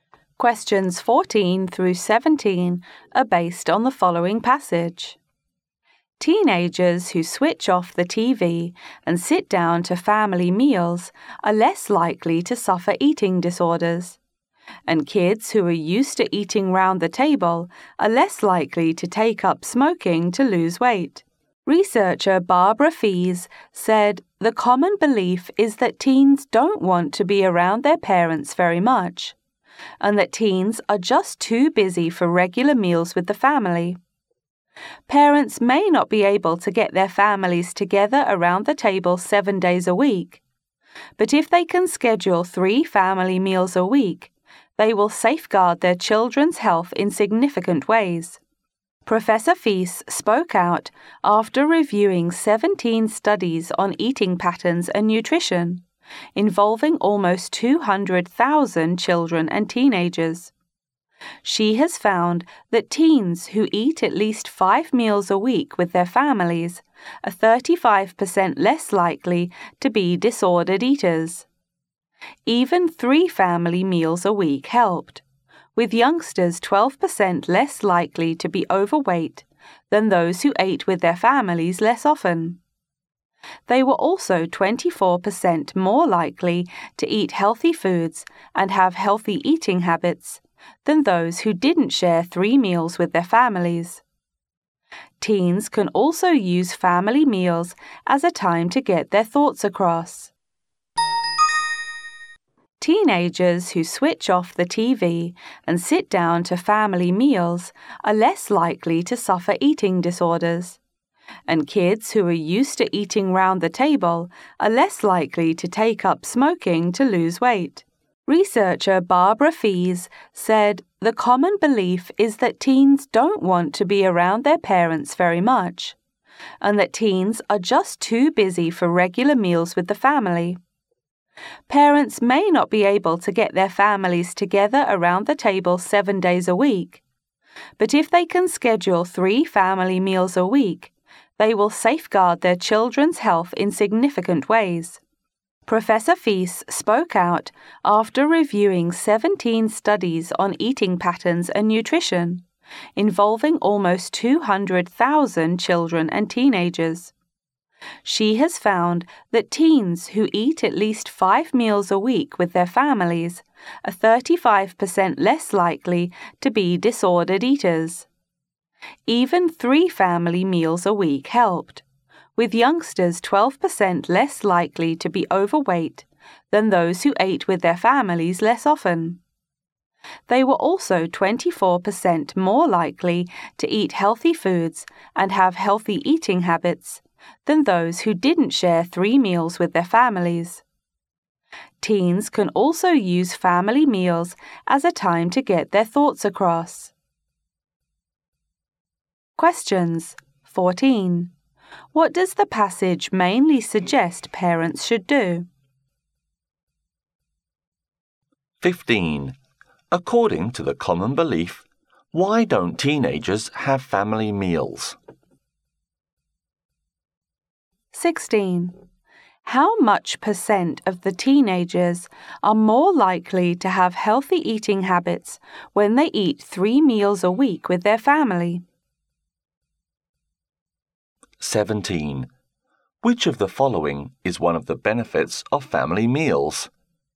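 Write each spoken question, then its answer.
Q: What does the passage mainly suggest parents should do?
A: Have family meals with their children, at least three a week

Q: According to the common belief, why don't teenagers have family meals?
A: They don't want to be around their parents and are too busy

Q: How much percent of the teenagers are more likely to have healthy eating habits when they eat 3 meals a week with their family?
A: 24%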